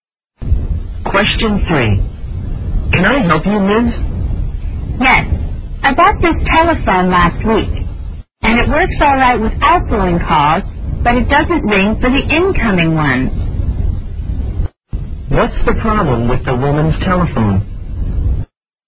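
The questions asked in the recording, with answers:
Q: What's the problem with the woman's telephone?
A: It doesn't ring for incoming calls.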